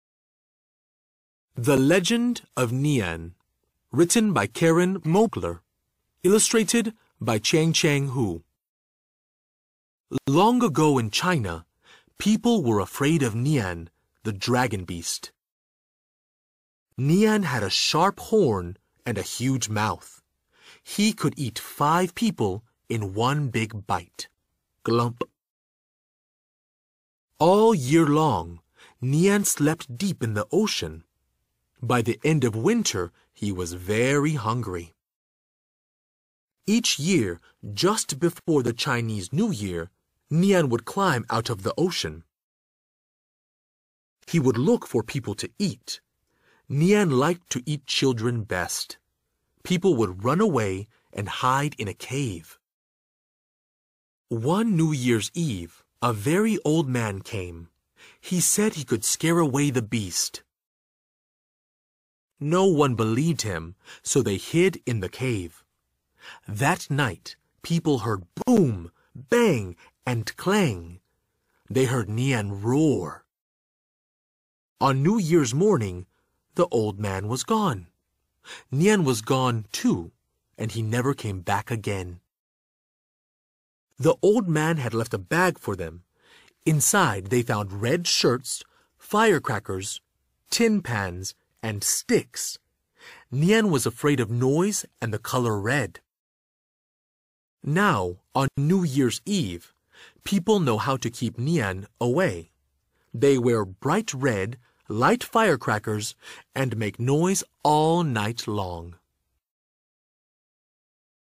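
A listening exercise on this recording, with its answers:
After the story, let's think about these questions. 聽完故事後,我們來思考一下這些問題:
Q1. What does Nian look like? ("年"是长什么样子呢?)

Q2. Why were people afraid of Nian? (为什么人们害怕"年"呢?)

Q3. How did the old man scare away Nian? (那名老者是如何吓走"年"的呢?)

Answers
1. A dragon beast with a sharp horn and a huge mouth
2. Because he ate people, especially children
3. With loud noise (firecrackers, banging tin pans) and the color red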